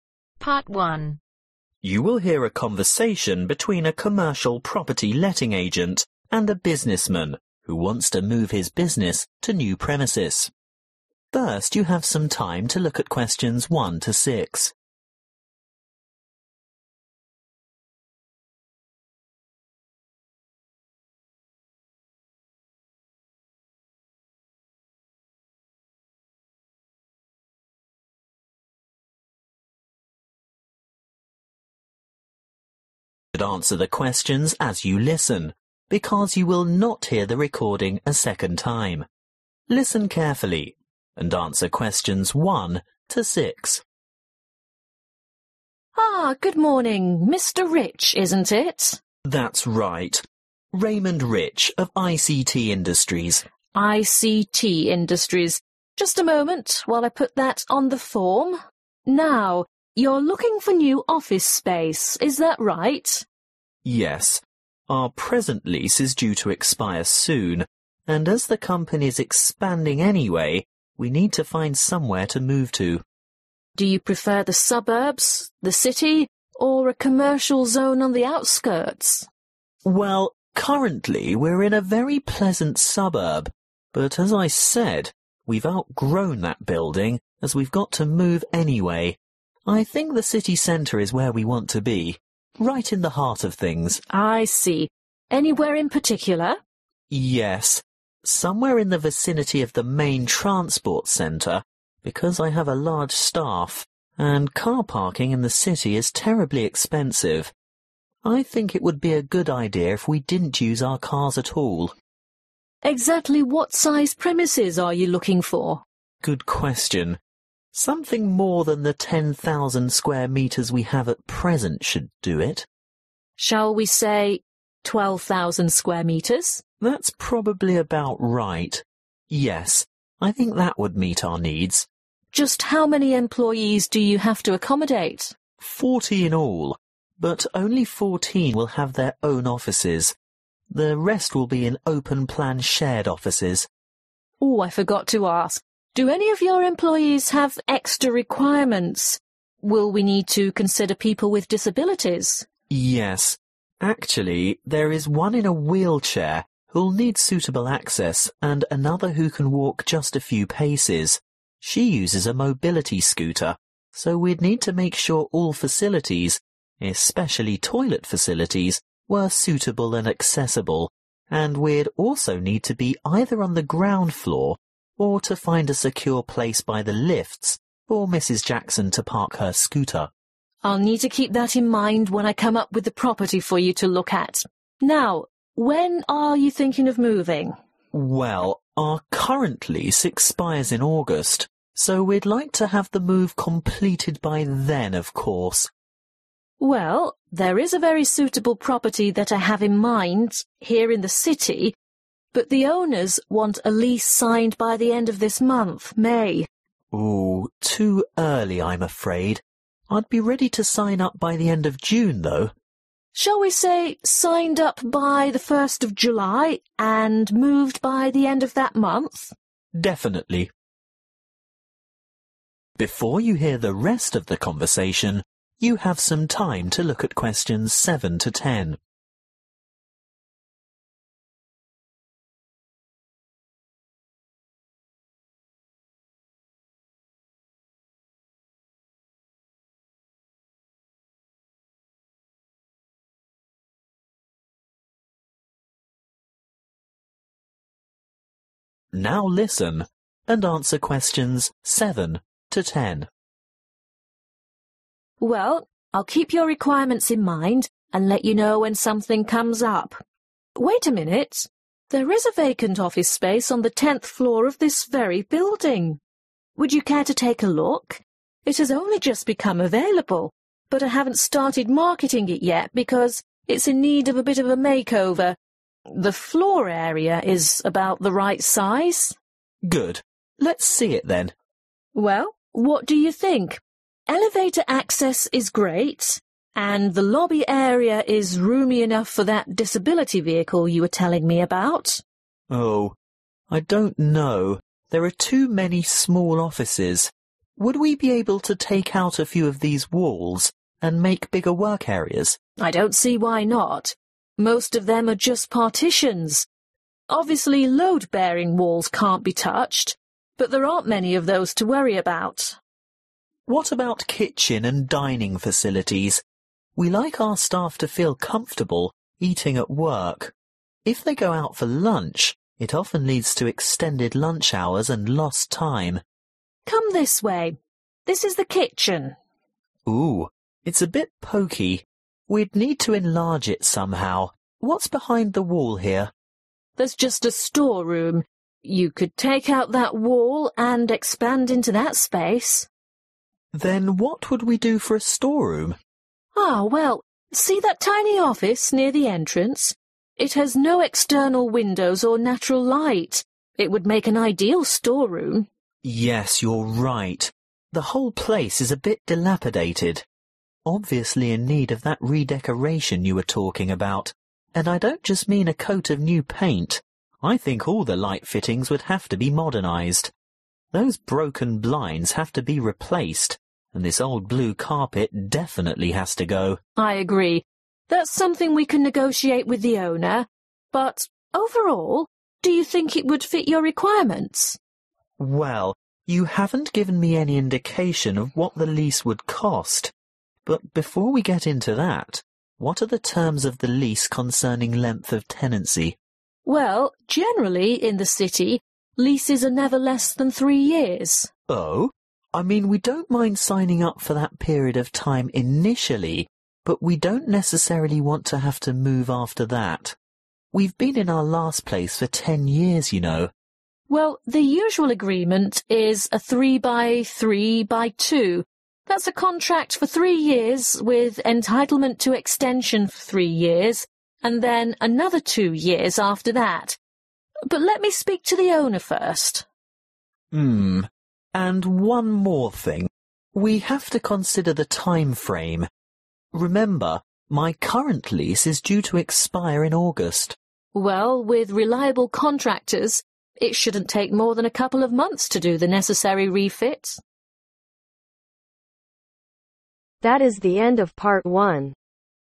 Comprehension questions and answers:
Complete the form below. Write NO MORE THAN TWO WORDS AND/OR A NUMBER for each answer.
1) Preferred location : (1) ..............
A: city center

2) Near : (2) ..............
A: transport center

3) Size : (3) ........ (SQ) (MT)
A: 12000 sq(uare) m (eters)

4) Number of staff : (4) ..............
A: forty/40

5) Special needs : (5) .............. access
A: wheelchair

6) Moving date : during month of (6) ..........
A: July

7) Removal of some (6) ............ partitions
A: walls/Partitions

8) (8) ........... too small-make bigger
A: kitchen

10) Minimum length of lease (10) ............ years (with right of renewal)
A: 3/three years